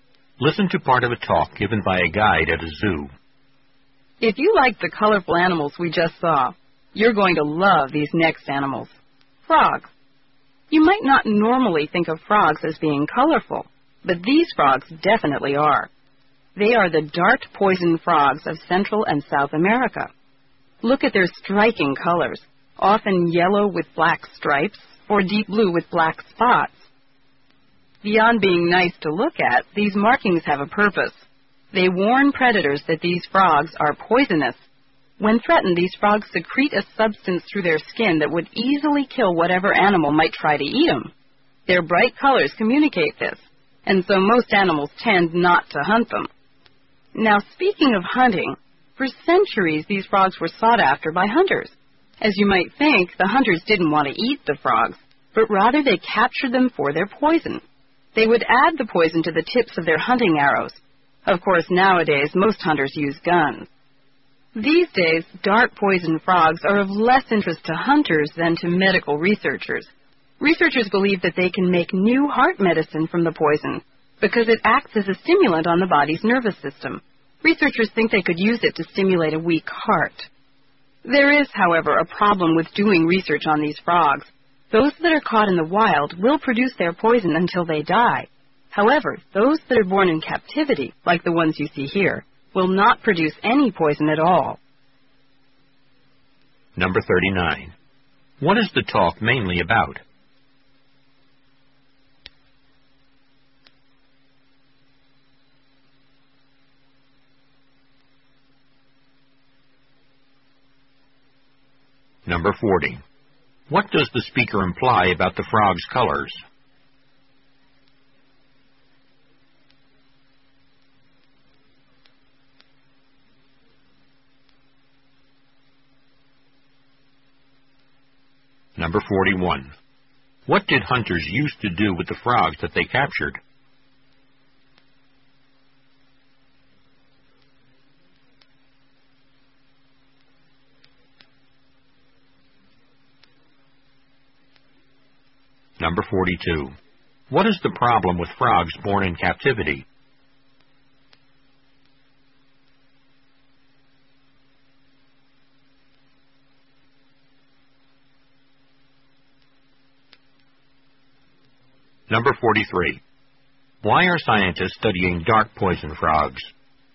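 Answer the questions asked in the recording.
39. Dart poison frogs
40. They warn predators that the frogs are poisonous
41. Put the frogs' poison on the tips of their arrows
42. They produce no poison
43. To make new heart medicine from their poison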